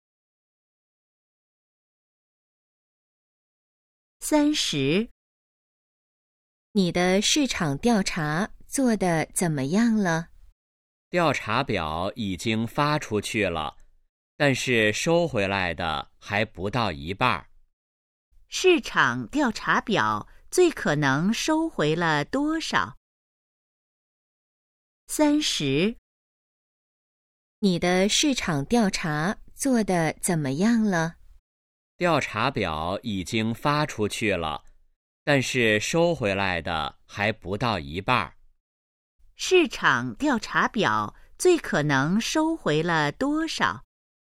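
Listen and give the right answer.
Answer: 不到一半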